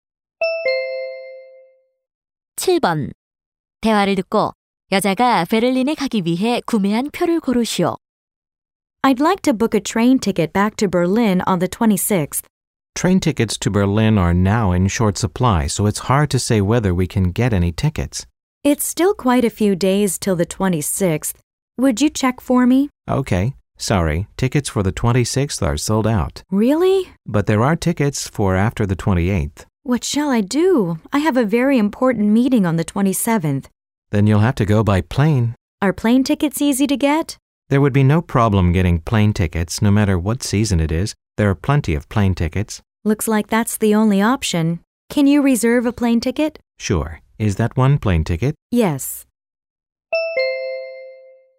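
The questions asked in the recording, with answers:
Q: 대화를 듣고 여자가 베를린에 가기 위해 구매한 표를 고르시오.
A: 비행기 표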